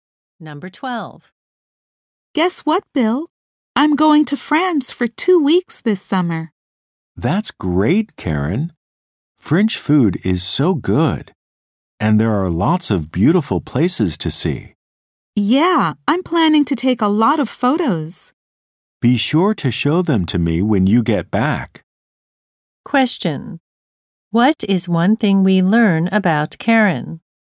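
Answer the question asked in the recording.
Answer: She is going to France for two weeks this summer.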